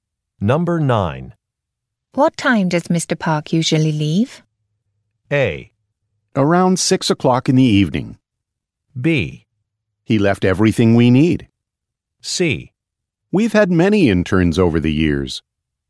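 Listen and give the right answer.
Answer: A: Around 6 o'clock in the evening.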